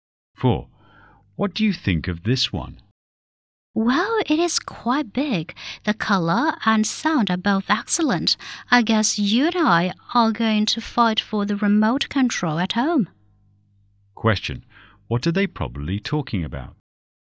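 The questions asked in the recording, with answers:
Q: What are they probably talking about?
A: A TV set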